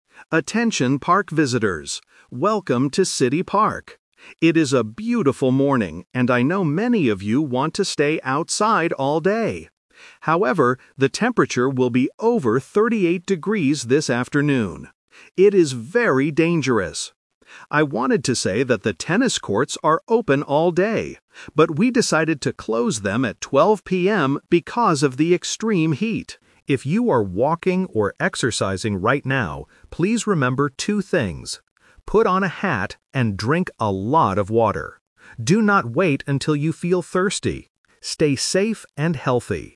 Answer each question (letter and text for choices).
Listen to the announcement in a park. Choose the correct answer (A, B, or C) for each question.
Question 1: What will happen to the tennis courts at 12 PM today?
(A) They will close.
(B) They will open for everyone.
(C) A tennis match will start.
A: (A) They will close.

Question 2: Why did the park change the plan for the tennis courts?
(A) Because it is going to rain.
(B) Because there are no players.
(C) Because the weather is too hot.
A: (C) Because the weather is too hot.

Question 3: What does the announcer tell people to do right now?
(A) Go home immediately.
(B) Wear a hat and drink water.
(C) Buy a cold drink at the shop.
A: (B) Wear a hat and drink water.

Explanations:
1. The announcer says, "we decided to close them at 12 PM". Option (B) is a trap; the original plan was to keep them open all day, but that changed. Option (C) is a plausible event for a tennis court, but it is not mentioned.
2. The announcer explains that they are closing the courts "because of the extreme heat" (the temperature is over 38 degrees). Option (A) is a trap; bad weather is a common reason to close a park, but today the problem is heat, not rain. Option (B) is not mentioned in the audio.
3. The announcer clearly reminds people exercising to "put on a hat and drink a lot of water." Option (A) is a trap; the weather is dangerous, but she doesn't tell people to go home right now. Option (C) is a plausible action, but buying water at a shop is not mentioned.

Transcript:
Announcer: Attention, park visitors. Welcome to City Park. It is a beautiful morning, and I know many of you want to stay outside all day. However, the temperature will be over 38 degrees this afternoon. It is very dangerous. I wanted to say that the tennis courts are open all day, but we decided to close them at 12 PM because of the extreme heat. If you are walking or exercising right now, please remember two things: put on a hat and drink a lot of water. Do not wait until you feel thirsty. Stay safe and healthy!

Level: A2